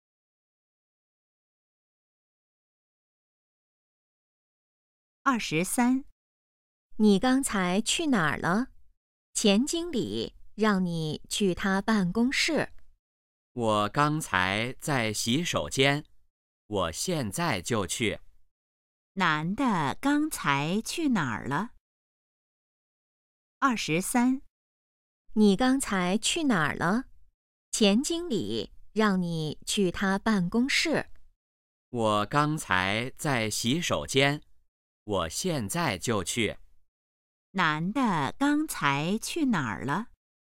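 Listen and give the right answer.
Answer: 洗手间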